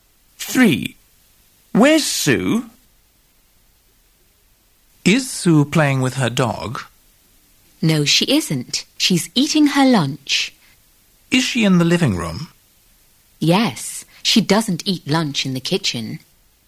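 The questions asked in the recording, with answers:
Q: Where's Sue?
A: In the living room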